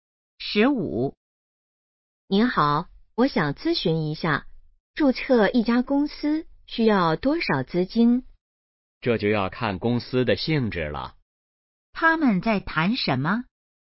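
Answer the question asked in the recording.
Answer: 注册公司需要多少资金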